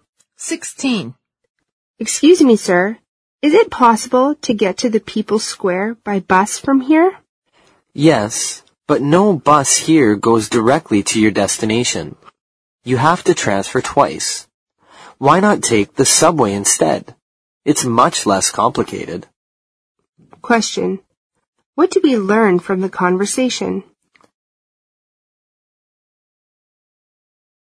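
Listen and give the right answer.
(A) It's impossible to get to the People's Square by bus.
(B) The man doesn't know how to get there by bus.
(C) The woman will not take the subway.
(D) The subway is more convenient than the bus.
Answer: (D) The subway is more convenient than the bus.

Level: 四级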